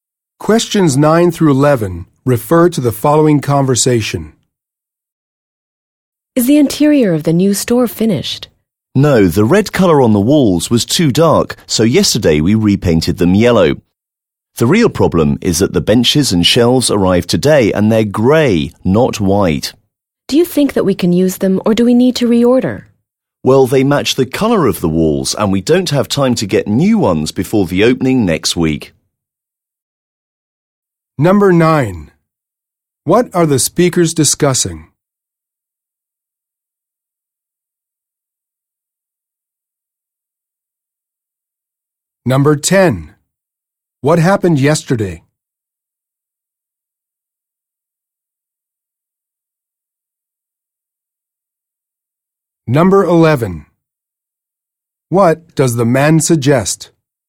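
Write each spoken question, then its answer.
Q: What are the speakers discussing?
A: The interior of the new store

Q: What happened yesterday?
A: The walls were repainted yellow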